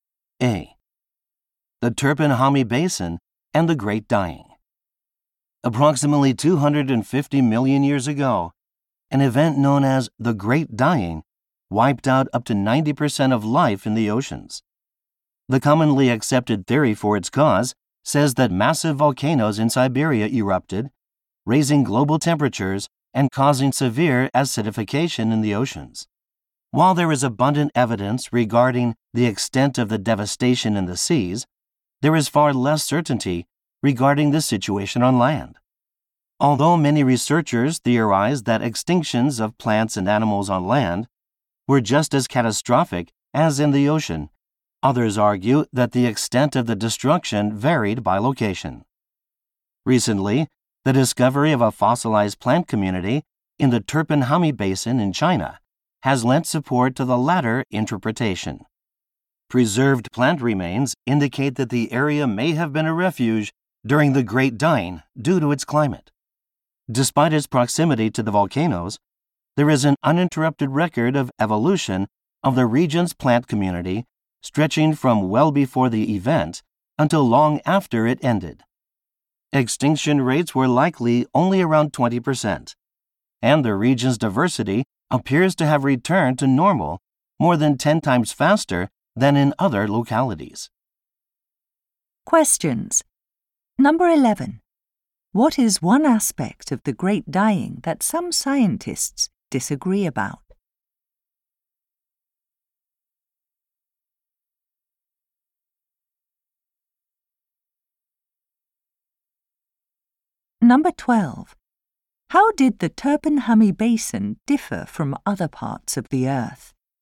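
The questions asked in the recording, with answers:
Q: What is one aspect of the Great Dying that some scientists disagree about?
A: Whether extinctions on land were as severe as in the oceans

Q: How did the Turpinhami Basin differ from other parts of the Earth?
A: Its climate made it a refuge, with low extinction and fast recovery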